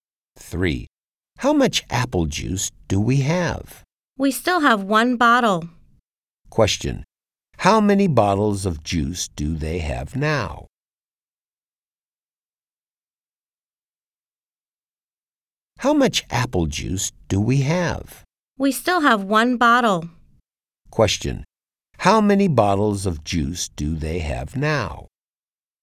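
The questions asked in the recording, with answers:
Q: How many bottles of juice do they have now?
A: 1 bottle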